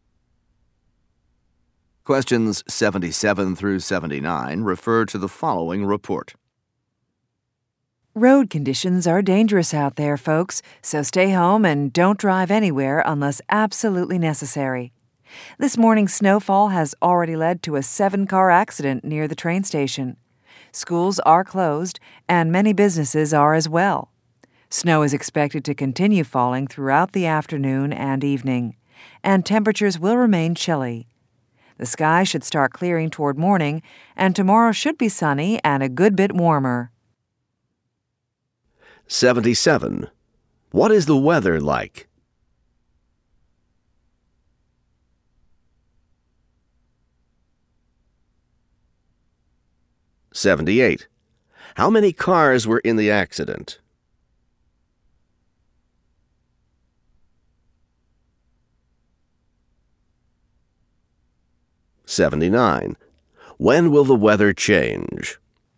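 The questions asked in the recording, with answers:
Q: What is the weather like?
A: Snowy and cold

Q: How many cars were in the accident?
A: Seven

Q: When will the weather change?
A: Toward morning / tomorrow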